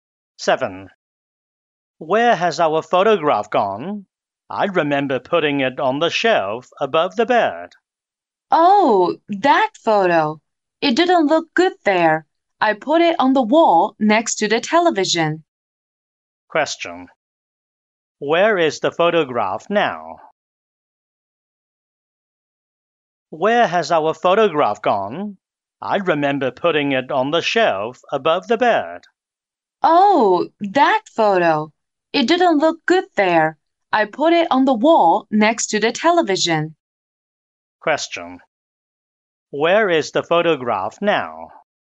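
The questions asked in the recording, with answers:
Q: Where is the photograph now?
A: On the wall next to the television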